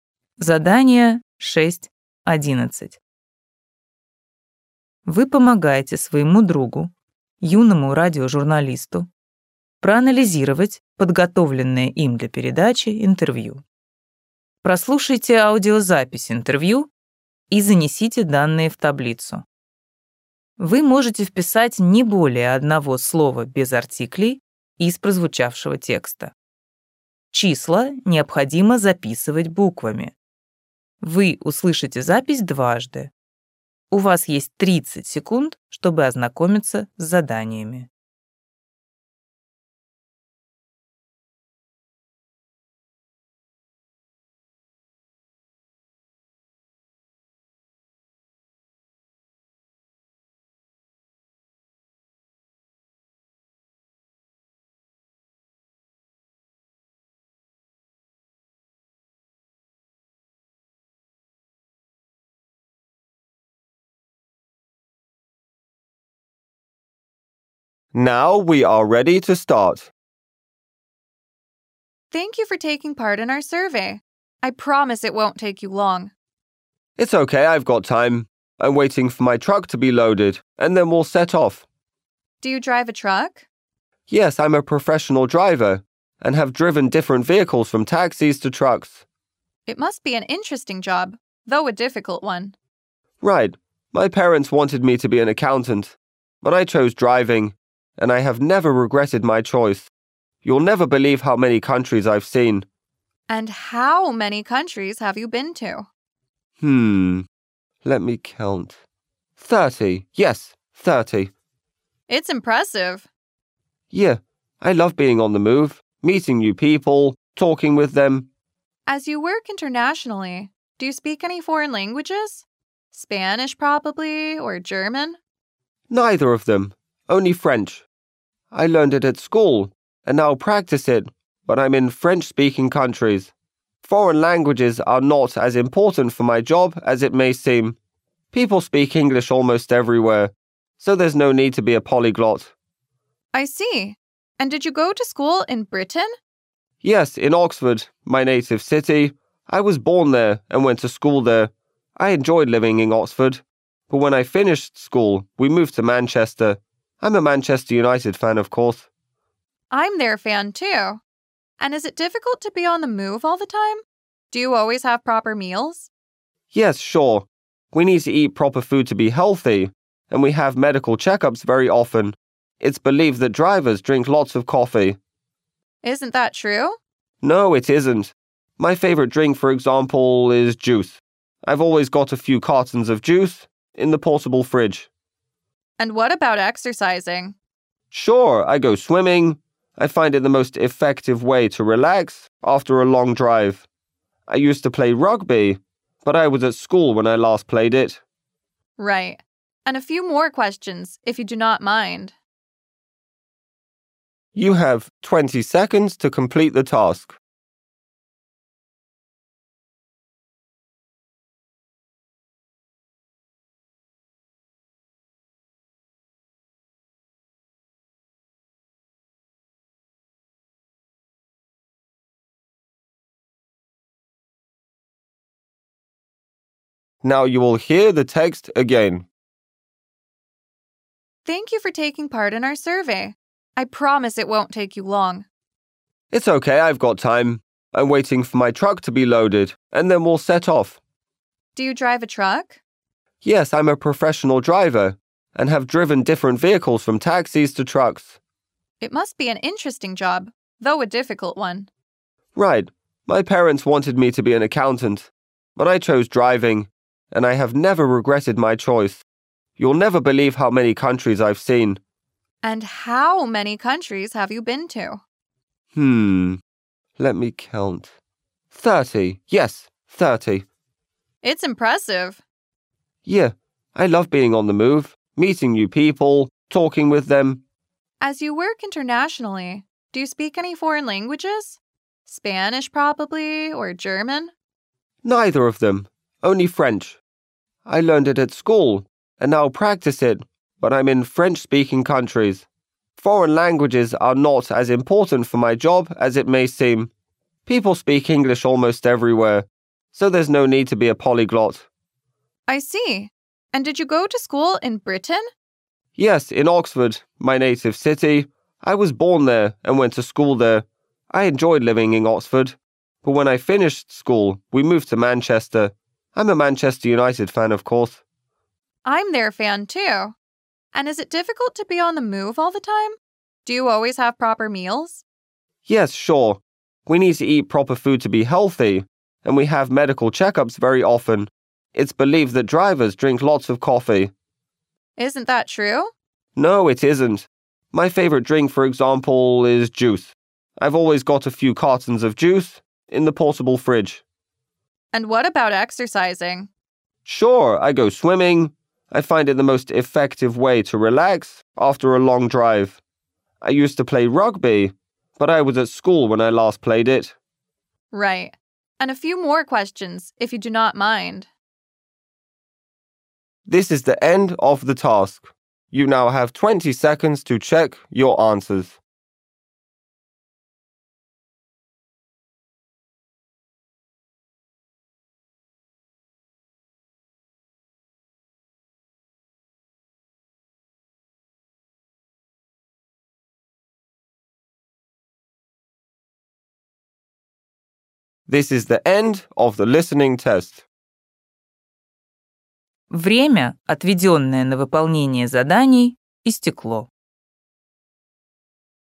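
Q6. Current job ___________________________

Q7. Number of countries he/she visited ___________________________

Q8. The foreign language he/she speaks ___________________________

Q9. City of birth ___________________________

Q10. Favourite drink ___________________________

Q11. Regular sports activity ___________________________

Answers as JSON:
{"6": "driver", "7": "thirty", "8": "French", "9": "Oxford", "10": "juice", "11": "swimming"}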